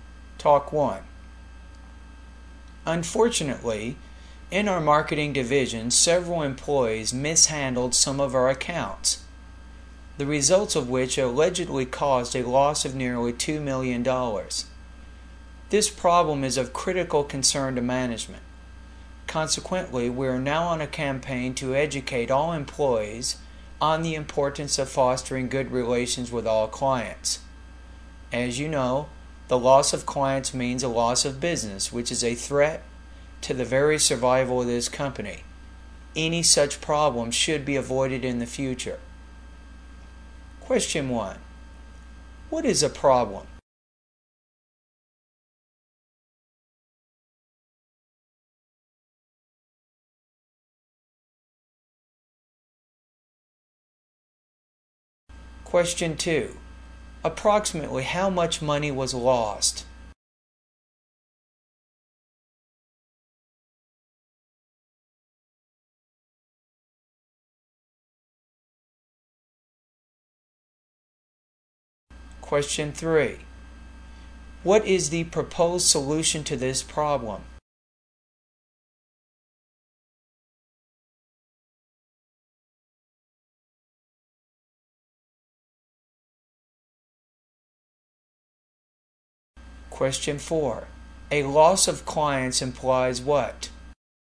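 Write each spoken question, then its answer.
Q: What is a problem?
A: Employees mishandled some accounts

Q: Approximately how much money was lost?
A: Nearly $2 million

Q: What is the proposed solution to this problem?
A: A campaign to educate employees on fostering good client relations

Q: A loss of clients implies what?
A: A loss of business, threatening the company's survival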